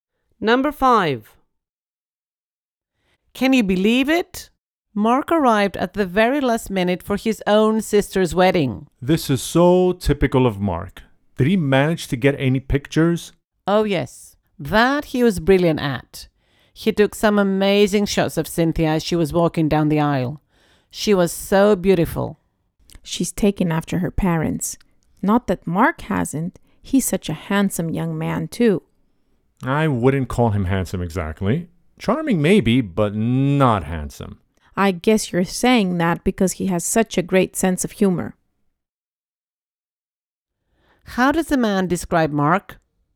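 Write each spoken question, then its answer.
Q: How does the man describe Mark?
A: Charming, but not handsome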